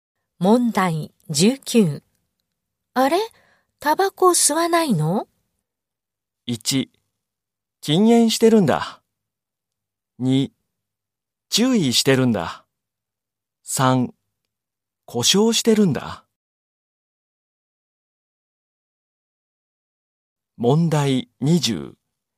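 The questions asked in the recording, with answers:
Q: あれ?タバコ吸わないの?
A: 1: 禁煙してるんだ。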